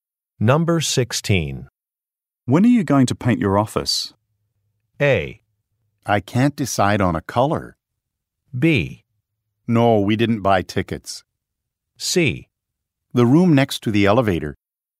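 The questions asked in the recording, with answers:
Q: When are you going to paint your office?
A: A: I can't decide on a color.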